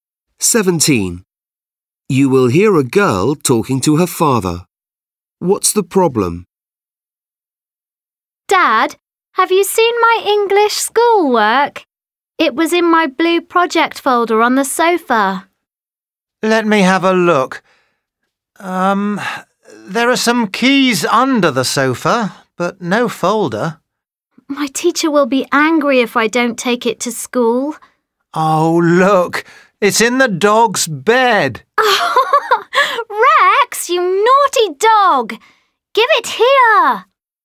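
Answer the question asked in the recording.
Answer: She can't find her English schoolwork (the dog has it).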